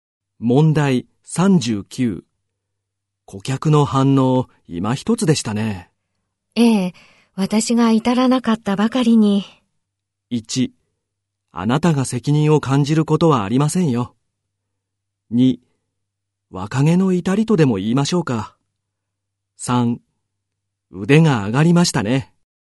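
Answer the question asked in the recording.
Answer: 1: あなたが責任を感じることはありませんよ。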